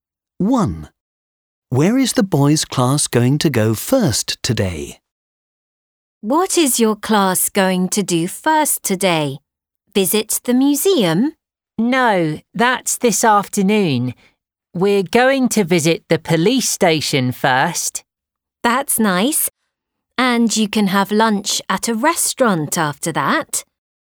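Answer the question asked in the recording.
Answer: The police station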